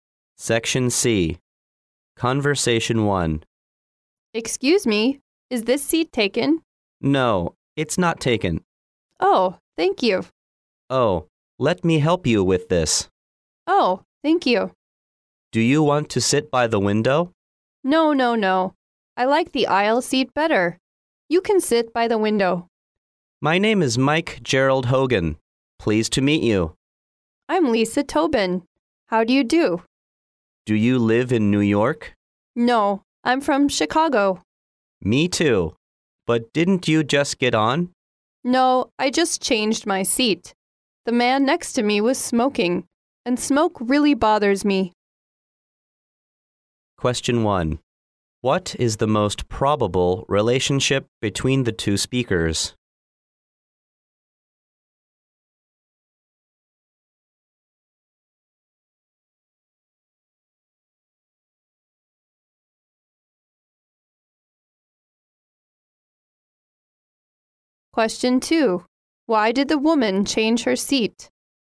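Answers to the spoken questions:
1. Strangers / fellow passengers
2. The man next to her was smoking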